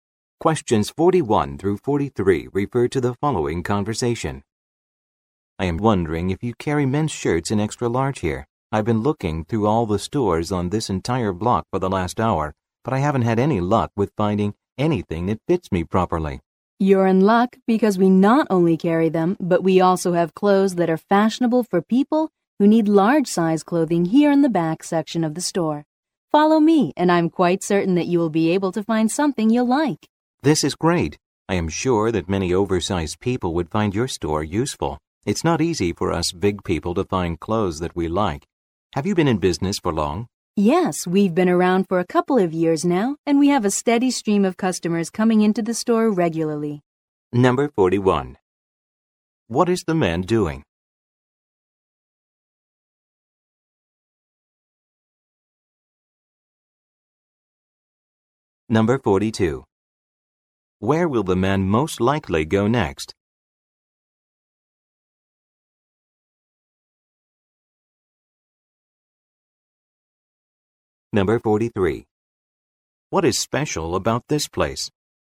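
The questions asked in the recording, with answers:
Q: What is the man doing?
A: Looking for extra large men's shirts

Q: Where will the man most likely go next?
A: The back section of the store

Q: What is special about this place?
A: It carries fashionable clothes in large sizes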